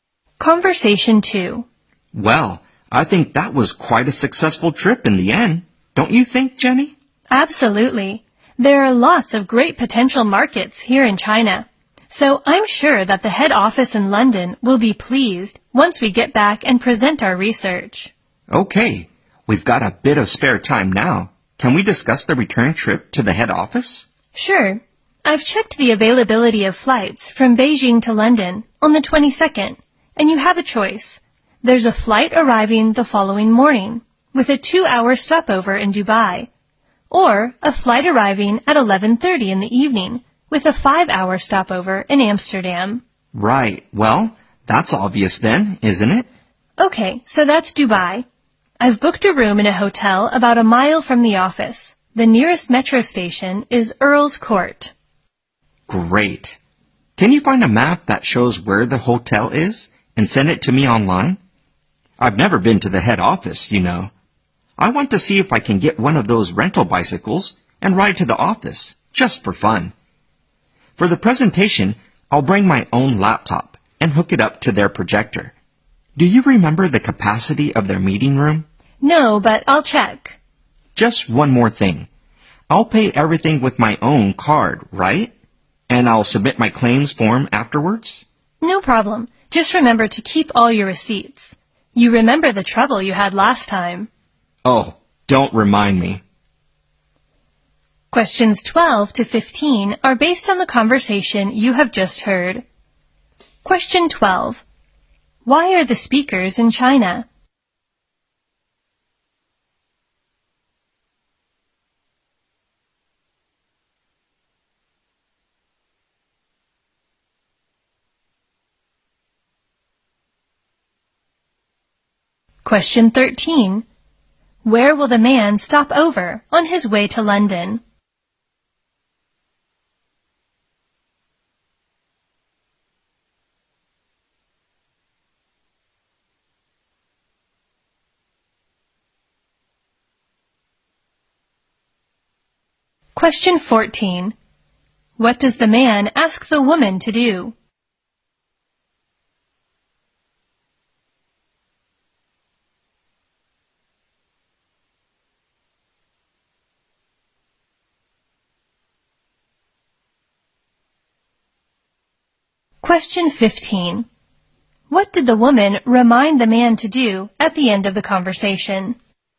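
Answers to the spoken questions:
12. To research potential markets
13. Dubai
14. Find a map showing the hotel and send it to him online
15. Keep all his receipts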